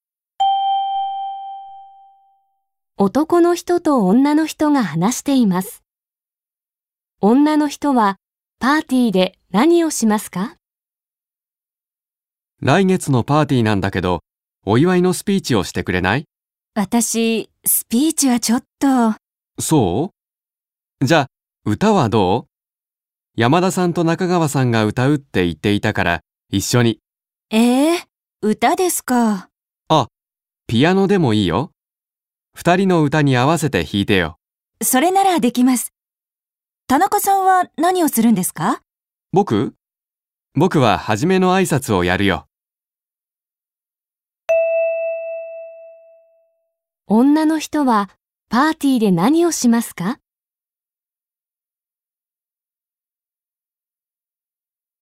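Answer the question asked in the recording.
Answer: ピアノを弾く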